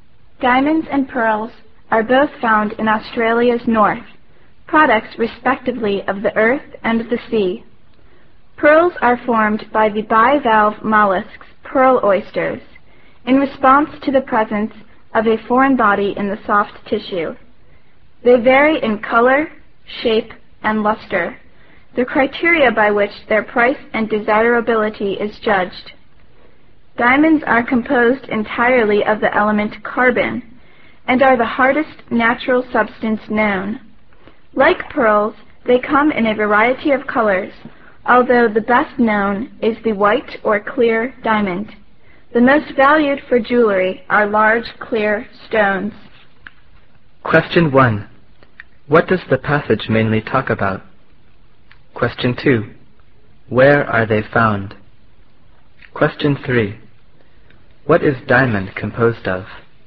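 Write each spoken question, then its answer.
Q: What does the passage mainly talk about?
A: Diamonds and pearls in Australia

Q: Where are they found?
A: In Australia's north

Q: What is diamond composed of?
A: Entirely of carbon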